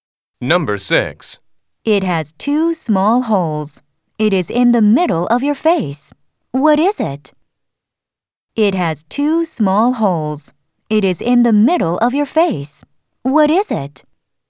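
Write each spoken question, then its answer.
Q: What is it?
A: a nose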